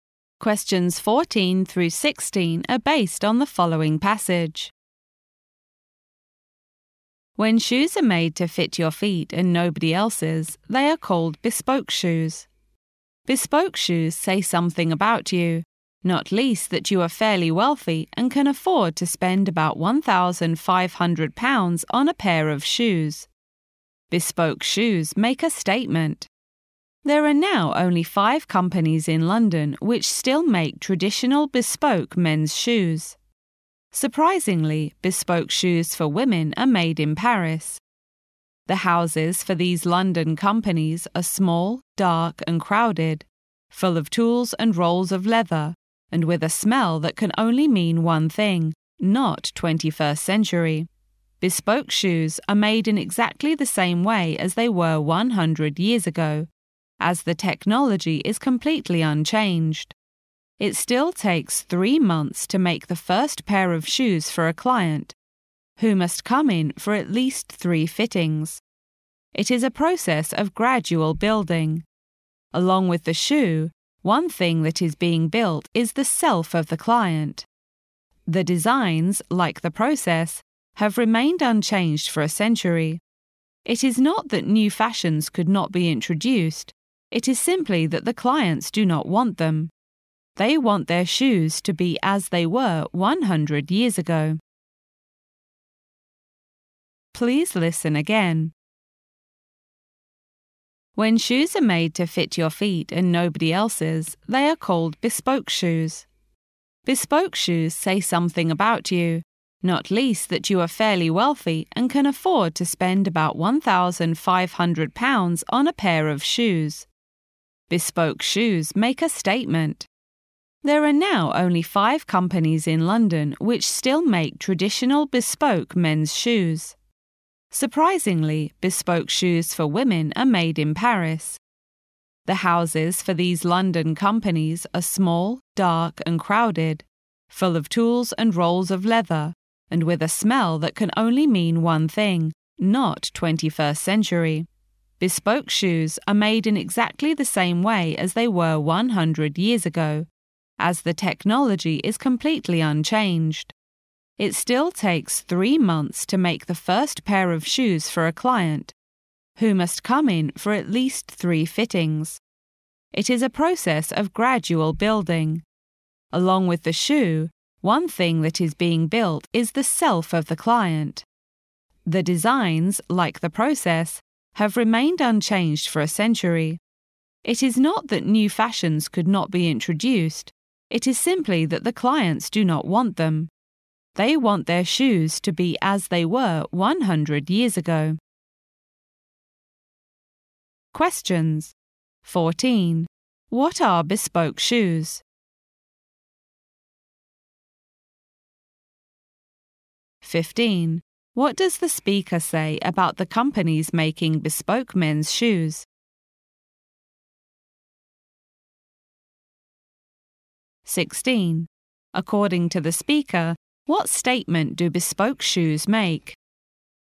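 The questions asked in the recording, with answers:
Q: What are bespoke shoes?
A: Shoes made to fit one particular person's feet

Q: What does the speaker say about the companies making bespoke men's shoes?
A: Only 5 remain in London

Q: According to the speaker, what statement do bespoke shoes make?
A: That the wearer is fairly wealthy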